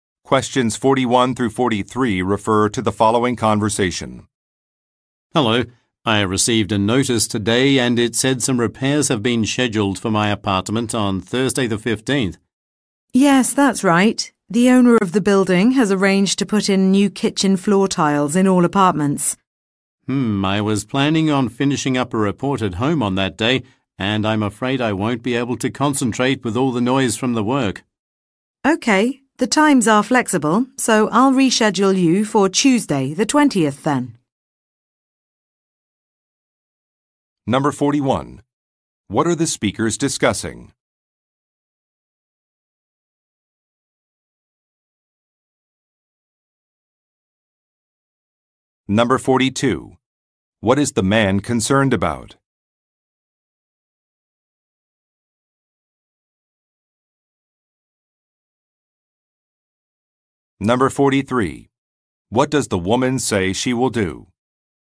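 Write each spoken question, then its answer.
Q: What are the speakers discussing?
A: Scheduled repairs (new kitchen floor tiles) in the apartment

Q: What is the man concerned about?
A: The noise will stop him concentrating on his report at home

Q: What does the woman say she will do?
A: Reschedule the work for Tuesday the 20th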